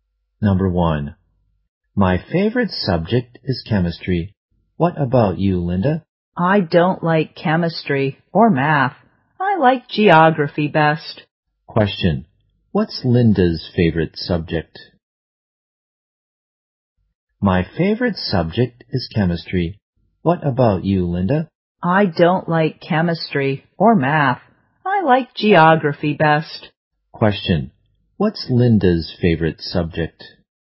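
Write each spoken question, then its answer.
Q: what's Linda's favorite subject?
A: Geography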